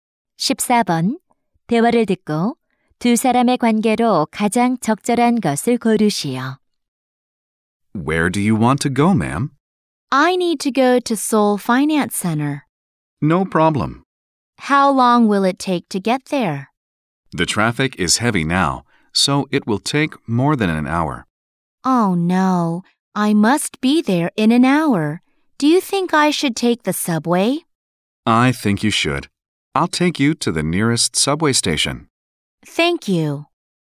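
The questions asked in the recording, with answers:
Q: 대화를 듣고 두 사람의 관계로 가장 적절한 것을 고르시오.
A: 택시 기사와 승객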